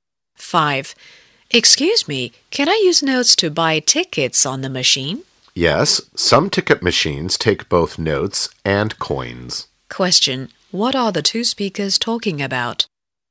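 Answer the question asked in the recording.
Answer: Buying tickets from a ticket machine with notes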